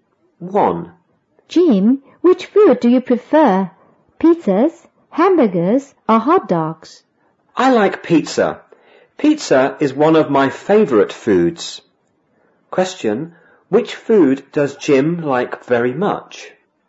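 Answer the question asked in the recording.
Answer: Pizza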